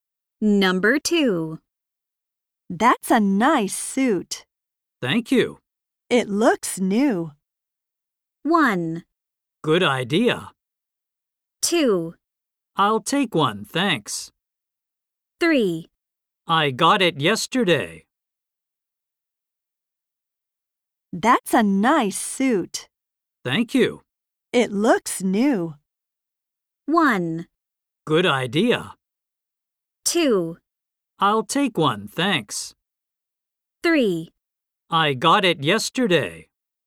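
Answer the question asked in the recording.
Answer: 3: I got it yesterday.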